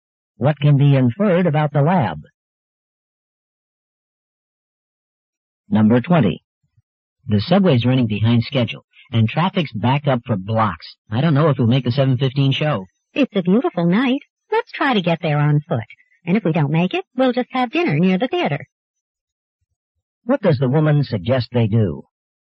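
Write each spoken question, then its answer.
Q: What does the woman suggest they do?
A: Walk to the theater.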